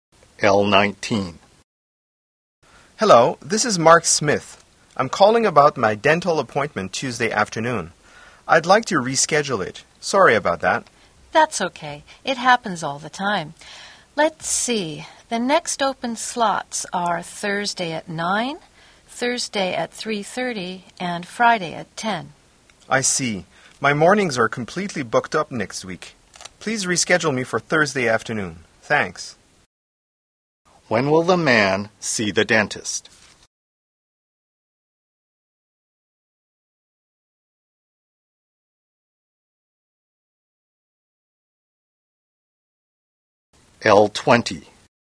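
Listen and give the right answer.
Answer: Thursday at 3:30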